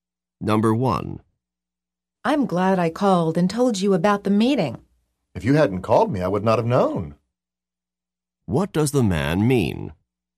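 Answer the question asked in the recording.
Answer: The woman called him, so he knew about the meeting.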